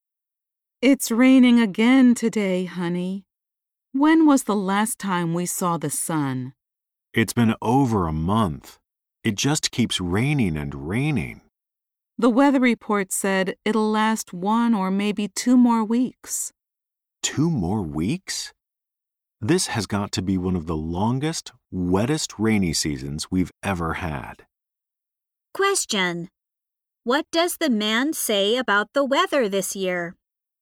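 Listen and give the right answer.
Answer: It has been one of the longest, wettest rainy seasons they've had.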